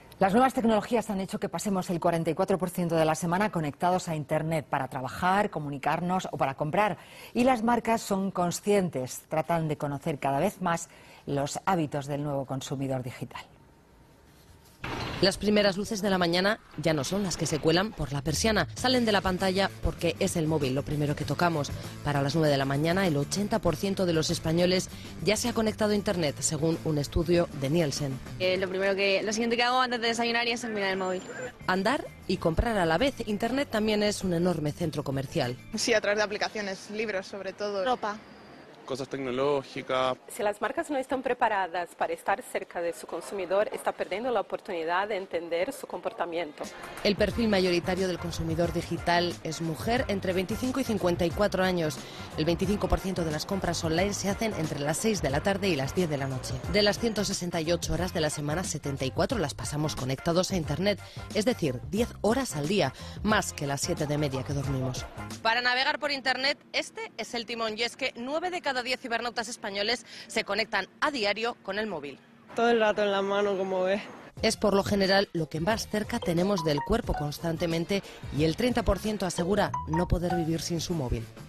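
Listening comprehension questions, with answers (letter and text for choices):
Escucha y haz las combinaciones correctas. 将下面的选项与百分比做匹配。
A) 25 %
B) 30 %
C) 44 %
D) > 50 %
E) 80 %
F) 90 %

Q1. tiempo que se está conectado a Internet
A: C) 44 %

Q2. momento del día cuando uno empieza a conectarse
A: E) 80 %

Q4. momento del día cuando se compra por Internet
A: A) 25 %

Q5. personas que se conectan a Internet con el móvil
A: F) 90 %

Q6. personas que dicen ser incapaces de vivir sin el móvil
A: B) 30 %

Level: B2级别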